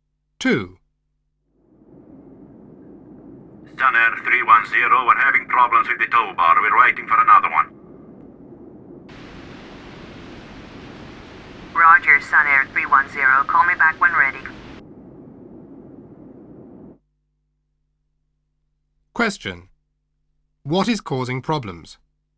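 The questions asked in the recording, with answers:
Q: What is causing problems?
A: The tow bar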